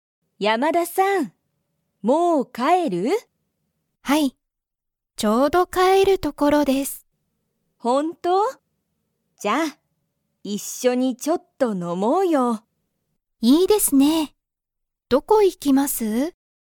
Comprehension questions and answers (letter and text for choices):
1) 山田やまださんは、____所ところだ。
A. まだ帰かえらない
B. ちょうど帰かえる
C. 全然帰ぜんぜんかえりたい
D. ちょっと帰かえった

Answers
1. B. ちょうど帰かえる

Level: Level 1